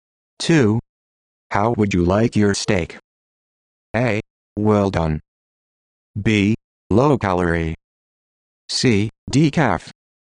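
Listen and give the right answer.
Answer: A: Well done.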